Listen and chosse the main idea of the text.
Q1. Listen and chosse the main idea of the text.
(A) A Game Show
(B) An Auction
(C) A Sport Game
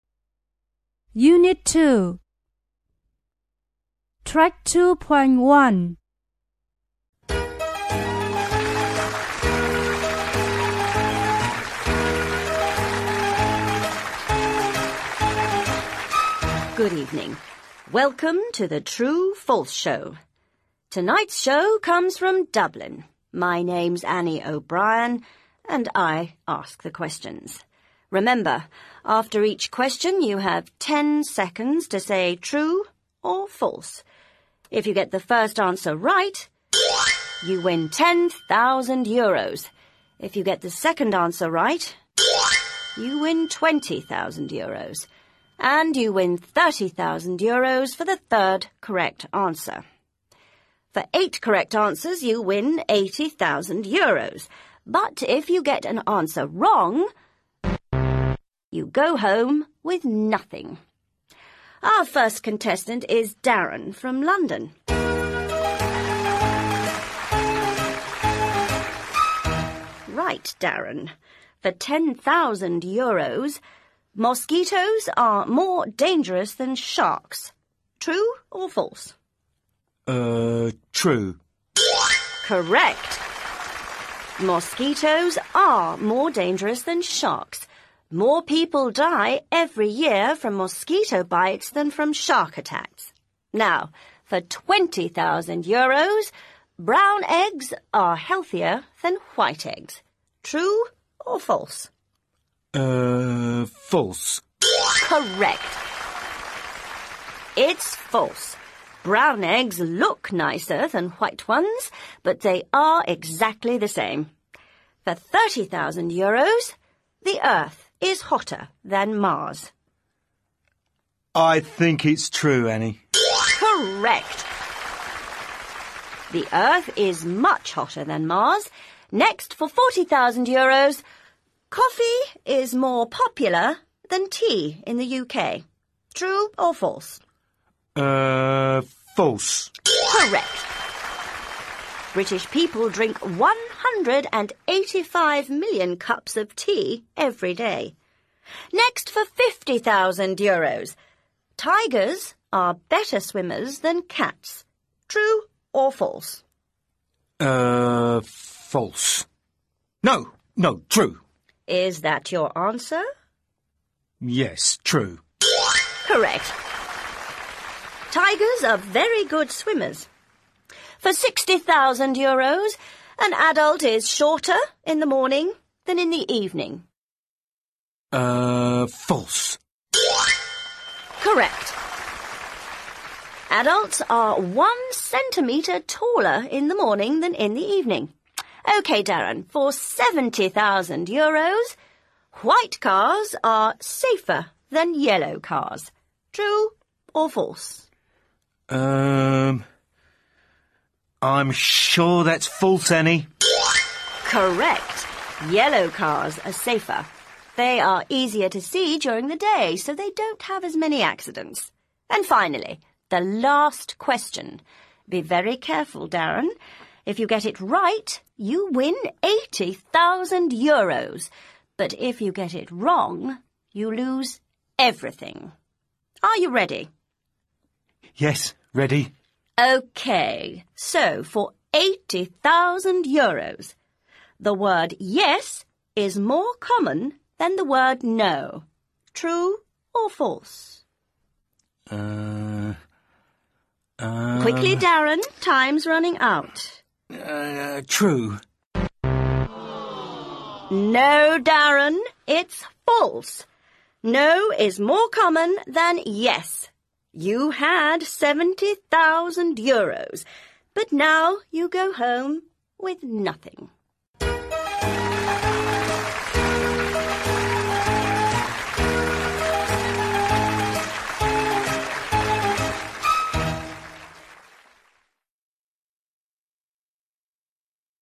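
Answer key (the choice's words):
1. A Game Show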